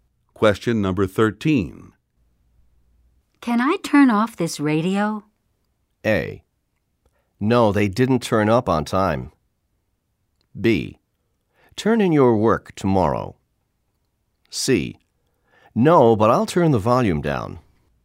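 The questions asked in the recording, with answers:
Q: Can I turn off this radio?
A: C: No, but I'll turn the volume down.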